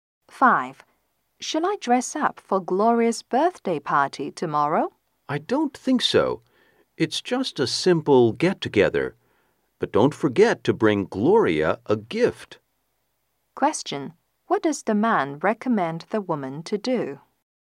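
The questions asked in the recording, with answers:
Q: What does the man recommend the woman to do?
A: Bring Gloria a gift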